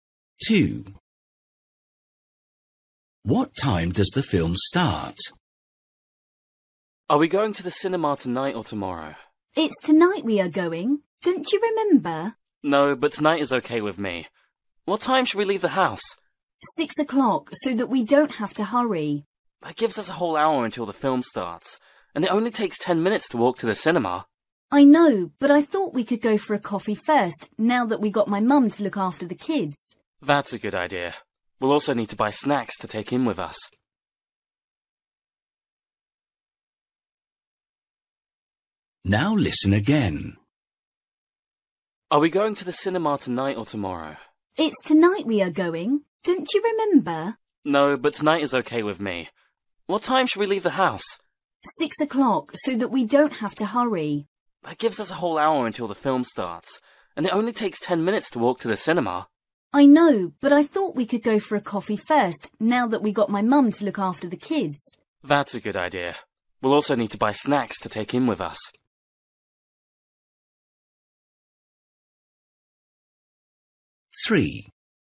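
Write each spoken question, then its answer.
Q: What time does the film start?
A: 7 o'clock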